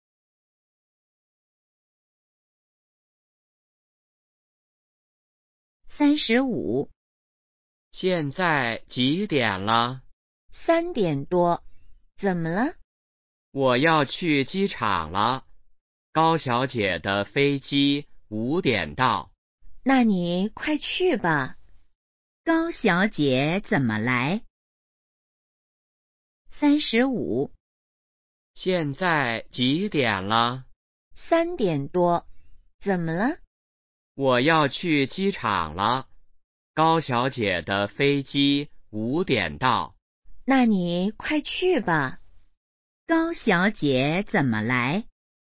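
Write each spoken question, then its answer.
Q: 高小姐怎么来?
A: 坐飞机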